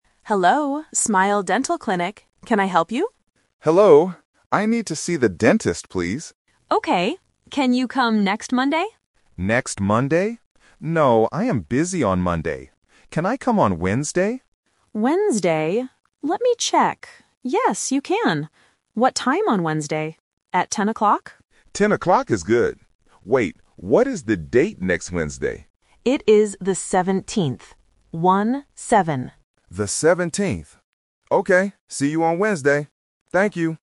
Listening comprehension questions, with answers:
Listen to the phone call between a patient and a nurse. Choose the correct answer (A, B, or C) for each question.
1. Who does the patient want to see?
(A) A doctor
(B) A dentist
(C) A teacher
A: A dentist

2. What day is the appointment?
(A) Monday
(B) Tuesday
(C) Wednesday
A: Wednesday

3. What is the date next Wednesday?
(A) The 7th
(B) The 10th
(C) The 17th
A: The 17th

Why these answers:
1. The patient clearly says, "I need to see the dentist, please." Option A (A doctor) is a related medical profession used as a distractor, but not the exact word mentioned. Option C (A teacher) is completely incorrect.
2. The nurse suggests "next Monday" (Option A is the trap). The patient says, "No, I am busy on Monday. Can I come on Wednesday?" The nurse confirms Wednesday is okay. Option B (Tuesday) is never mentioned.
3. The nurse says, "It is the 17th," and repeats "One-seven" to be clear. Option B (The 10th) is a trap because 10 is the time of the appointment (10 o'clock), not the date. Option A (The 7th) is a phonetic trap for the number 17.

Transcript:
Nurse: Hello, Smile Dental Clinic. Can I help you?
Patient: Hello. I need to see the dentist, please.
Nurse: Okay. Can you come next Monday?
Patient: Next Monday? No, I am busy on Monday. Can I come on Wednesday?
Nurse: Wednesday... Let me check. Yes, you can. What time on Wednesday? At 10 o'clock?
Patient: 10 o'clock is good. Wait, what is the date next Wednesday?
Nurse: It is the 17th. One-seven.
Patient: The 17th. Okay, see you on Wednesday. Thank you.

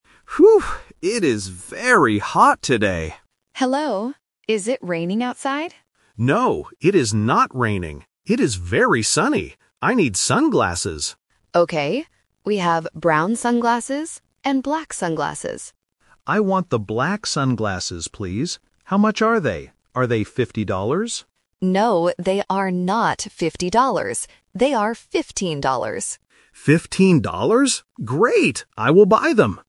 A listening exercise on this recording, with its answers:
Listen to the conversation in a shop. Circle the correct answer (A, B, or C).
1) What is the weather like outside?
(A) Raining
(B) Sunny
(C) Cloudy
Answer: Sunny

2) What color sunglasses does the customer want?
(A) Brown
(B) Black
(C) White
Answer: Black

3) How much are the sunglasses?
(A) 15 dollars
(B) 50 dollars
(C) 5 dollars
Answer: 15 dollars

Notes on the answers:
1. The customer says clearly, "It is very sunny." The Trap: Option (A) "Raining" is mentioned because the shop assistant asks "Is it raining outside?", but the customer answers "No, it is not raining." Not Mentioned: Option (C) "Cloudy" is never mentioned in the audio.
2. The customer says, "I want the black sunglasses, please." The Trap: Option (A) "Brown" is mentioned by the shop assistant as another choice ("We have brown sunglasses..."), but the customer does not choose them. Not Mentioned: Option (C) "White" is completely new information.
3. The shop assistant explicitly says the price: "They are fifteen dollars," and the customer repeats it. The Trap: Option (B) "50 dollars" is mentioned because the customer guesses the price ("Are they fifty dollars?"), but the assistant says "No". "Fifteen" and "fifty" also sound very similar, which is a classic listening trap. Not Mentioned: Option (C) "5 dollars" is not in the audio.

